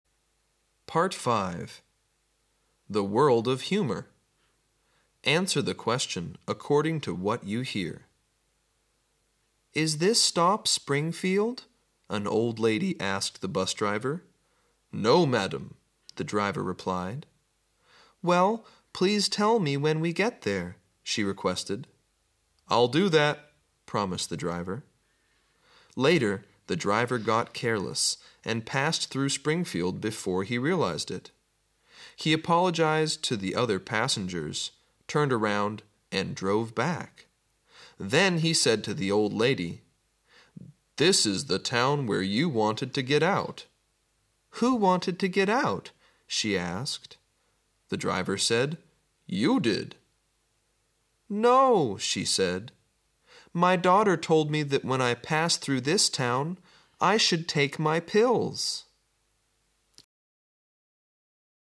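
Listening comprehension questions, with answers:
Listen to the tape and answer the question:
Did the old lady get off at Springfield? Why?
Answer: No. She didn't want to get off there; her daughter had told her to take her pills when she passed through Springfield.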